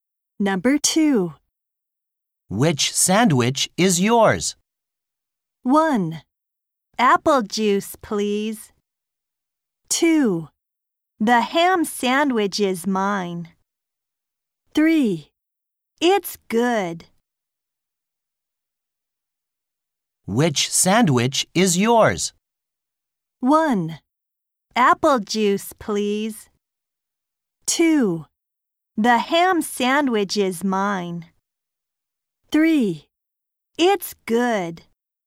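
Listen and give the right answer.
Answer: 2: The ham sandwich is mine.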